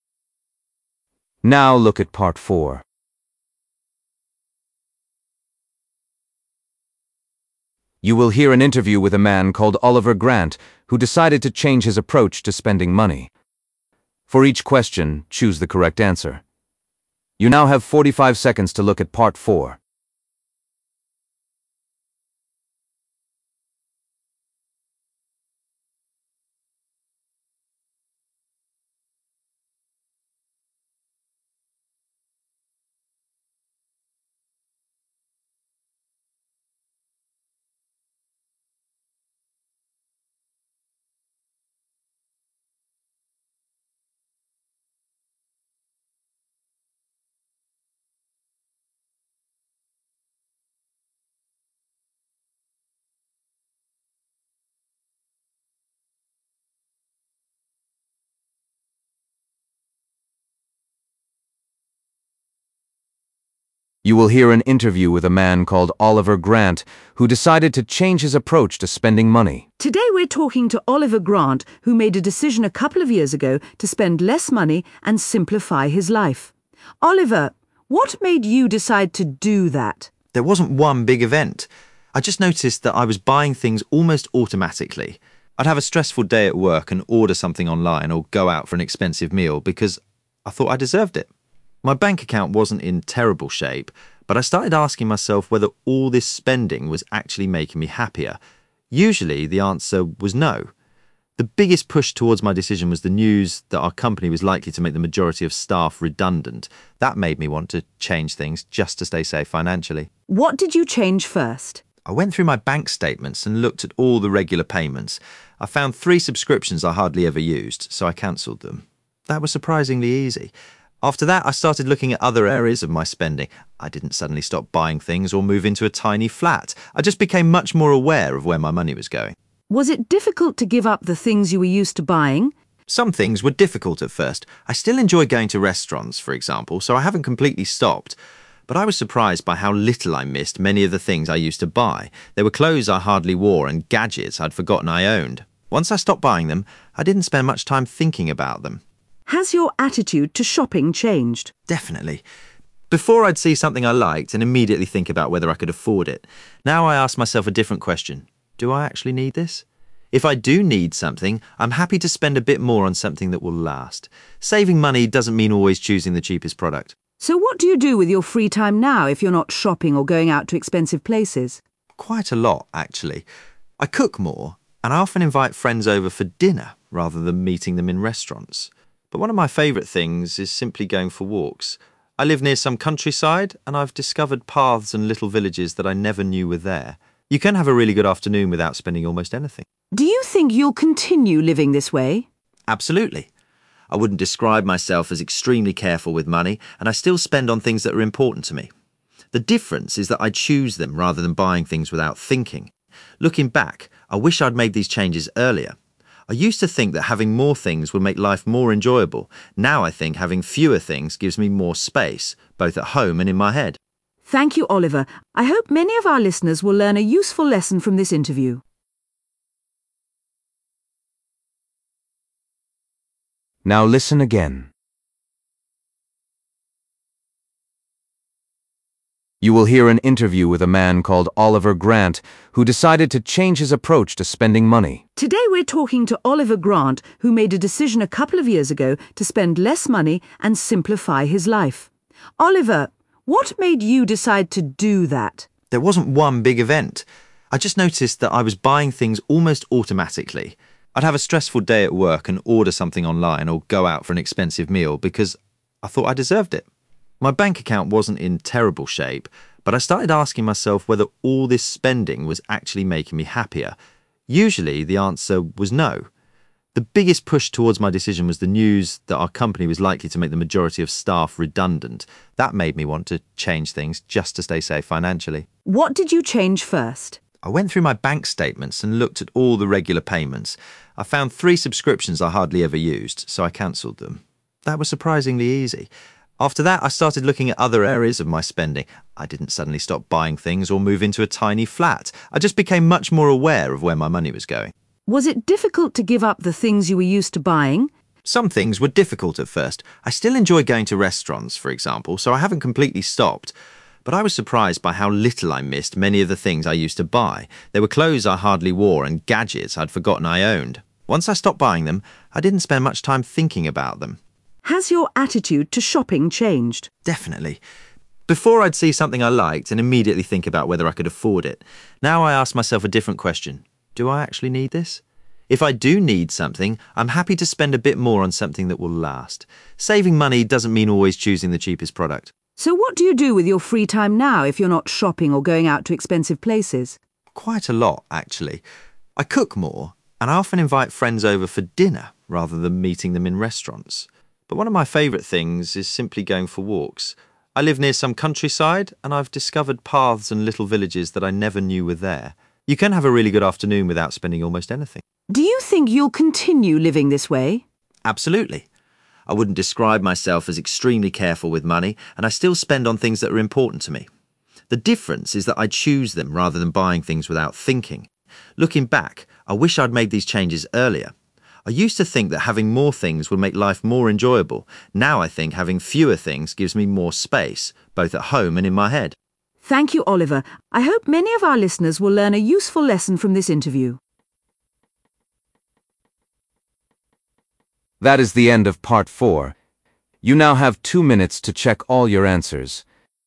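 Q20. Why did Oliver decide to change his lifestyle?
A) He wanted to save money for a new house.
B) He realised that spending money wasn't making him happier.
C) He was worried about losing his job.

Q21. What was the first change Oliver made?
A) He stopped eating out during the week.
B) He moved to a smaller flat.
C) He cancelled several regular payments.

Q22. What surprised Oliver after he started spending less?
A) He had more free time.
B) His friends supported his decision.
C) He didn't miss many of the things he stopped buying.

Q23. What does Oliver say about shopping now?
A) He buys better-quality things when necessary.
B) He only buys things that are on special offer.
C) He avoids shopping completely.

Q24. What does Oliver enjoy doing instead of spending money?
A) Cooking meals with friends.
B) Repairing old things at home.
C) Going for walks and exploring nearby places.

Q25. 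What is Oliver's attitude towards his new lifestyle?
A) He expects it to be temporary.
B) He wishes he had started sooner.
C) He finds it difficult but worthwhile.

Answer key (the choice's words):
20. He was worried about losing his job.
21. He cancelled several regular payments.
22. He didn't miss many of the things he stopped buying.
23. He buys better-quality things when necessary.
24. Going for walks and exploring nearby places.
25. He wishes he had started sooner.

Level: B1 Preliminary (PET)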